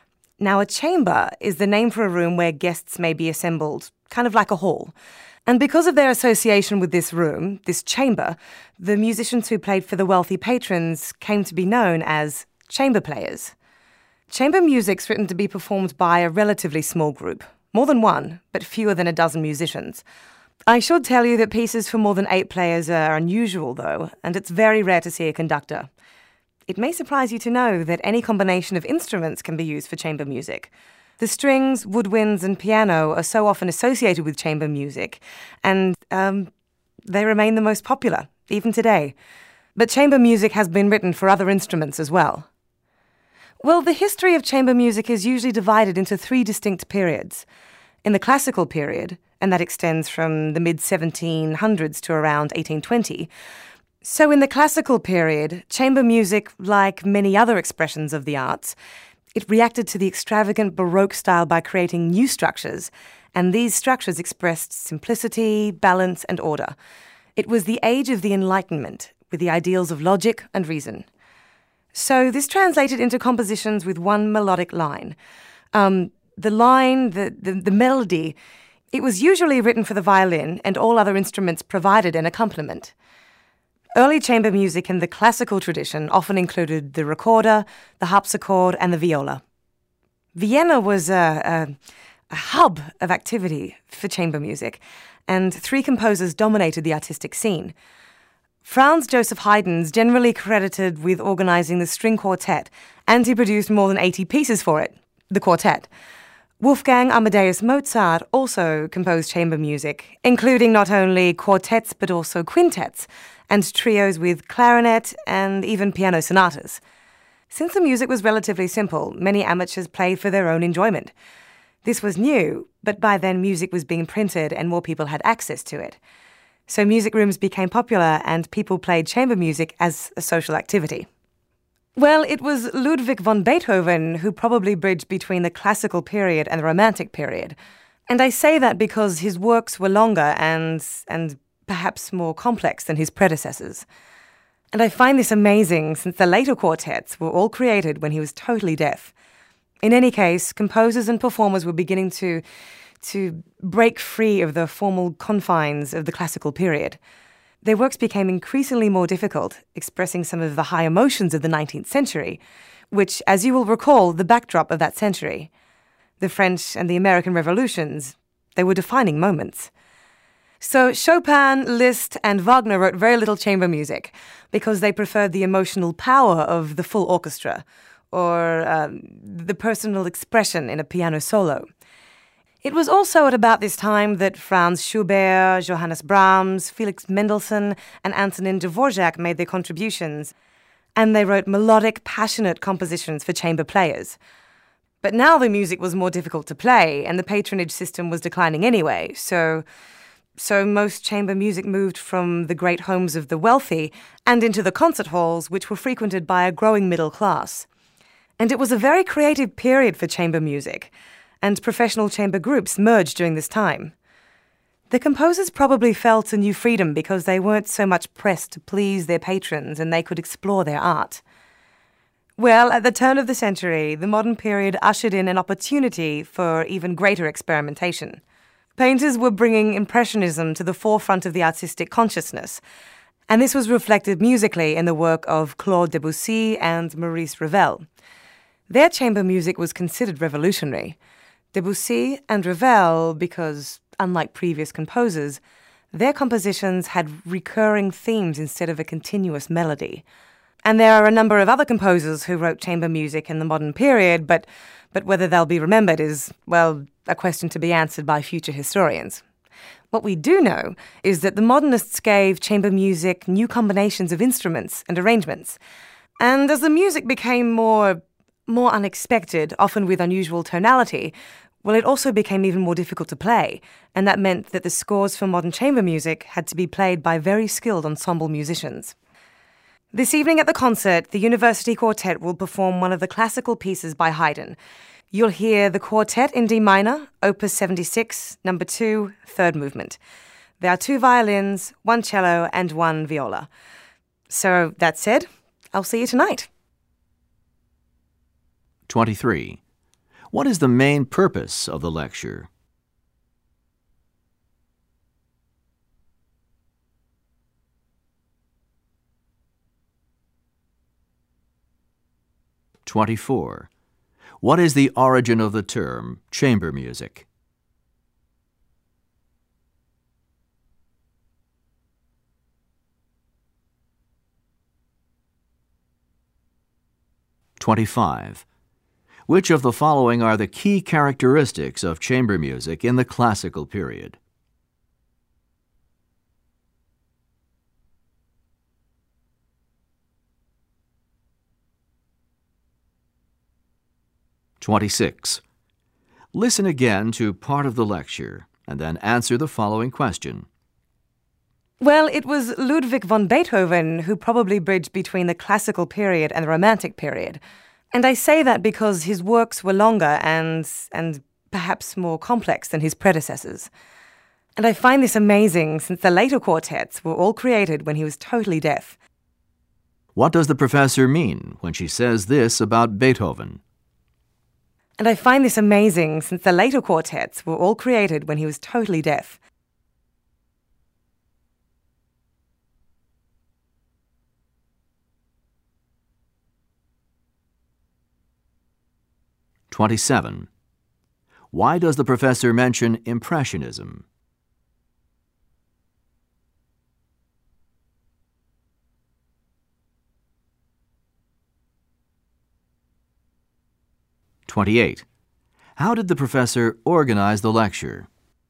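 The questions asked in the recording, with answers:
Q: What is the origin of the term chamber music?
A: It comes from the chamber, a room in wealthy homes where guests gathered and musicians played

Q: What does the professor mean when she says this about Beethoven?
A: She admires Beethoven for writing complex late quartets even though he was deaf

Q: Why does the professor mention Impressionism?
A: To show that the painting movement was reflected in the music of Debussy and Ravel

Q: How did the professor organize the lecture?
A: In chronological order by historical period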